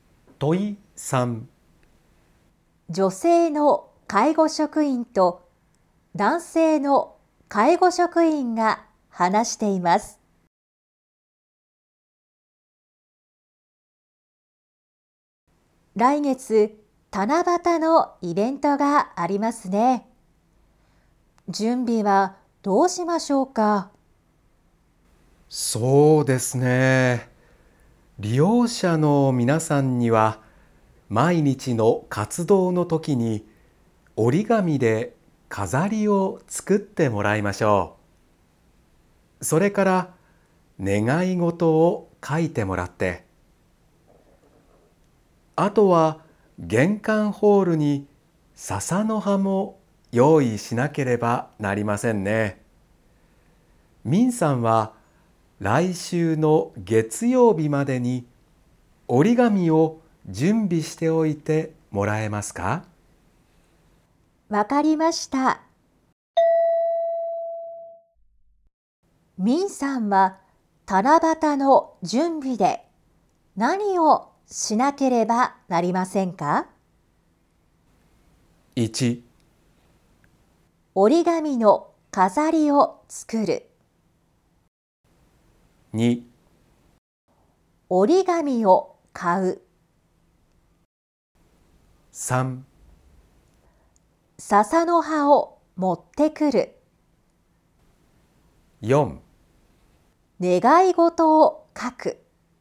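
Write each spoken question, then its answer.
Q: ミンさんは七夕の準備で何をしなければなりませんか?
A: 2: 折り紙を買う。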